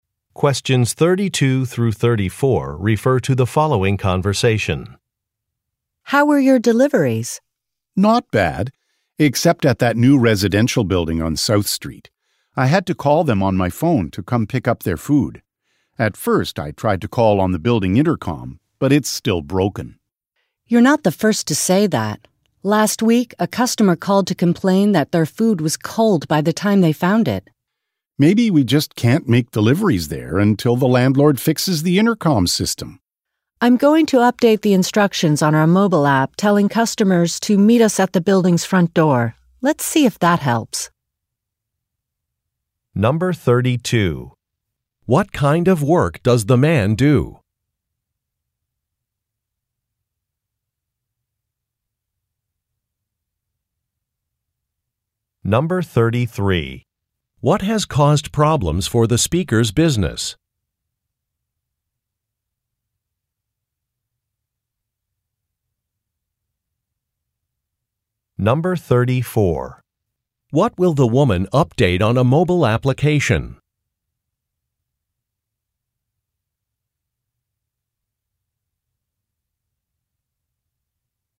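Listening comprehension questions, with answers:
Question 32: What kind of work does the man do?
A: He delivers food.

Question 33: What has caused problems for the speakers' business?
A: A broken building intercom

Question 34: What will the woman update on a mobile application?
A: The delivery instructions for customers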